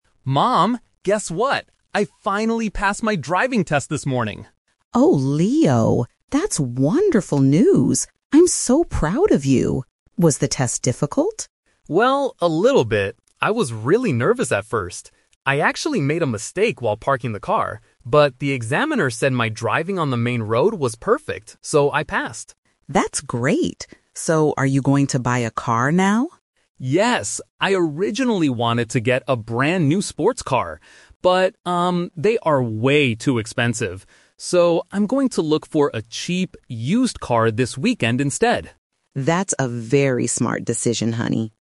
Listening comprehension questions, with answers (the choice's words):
Listen to the conversation between a son and his mother. For each question, choose the correct answer (A, B, or C).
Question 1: How did the boy's driving test go?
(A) He failed because he couldn't park the car.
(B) He passed even though he made a small mistake.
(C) He drove perfectly from the beginning to the end.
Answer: He passed even though he made a small mistake.

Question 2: What kind of car is the boy planning to buy?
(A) A brand new sports car.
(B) An expensive family car.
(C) An old, inexpensive car.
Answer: An old, inexpensive car.

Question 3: What does the mother think about her son's final decision?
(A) She thinks it is a good idea.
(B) She wants him to buy a new car.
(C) She thinks he is spending too much money.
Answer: She thinks it is a good idea.

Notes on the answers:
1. The son says he "made a mistake while parking" but the examiner said his driving on the road was perfect, "so I passed." Option A is a trap because he mentions a parking mistake, but he didn't fail. Option C is wrong because his driving wasn't 100% perfect (he made a parking mistake).
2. This question uses "The Twist" technique. The son says he wanted a new sports car (Option A - Trap), but it was too expensive. Therefore, his actual plan is to buy a "cheap, used car," which is paraphrased as an "old, inexpensive car" in Option C.
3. After the son says he will buy a cheap, used car, the mother replies, "That's a very smart decision." This means she thinks it is a good idea. Option C is a trap because the son is the one who talks about things being expensive, not the mother.

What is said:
Leo: Mom, guess what? I finally passed my driving test this morning!
Mom: Oh, Leo, that's wonderful news! I'm so proud of you. Was the test difficult?
Leo: Well, a little bit. I was really nervous at first. I actually made a mistake while parking the car, but the examiner said my driving on the main road was perfect, so I passed.
Mom: That's great! So, are you going to buy a car now?
Leo: Yes! I originally wanted to get a brand new sports car. But, um, they are way too expensive. So, I'm going to look for a cheap, used car this weekend instead.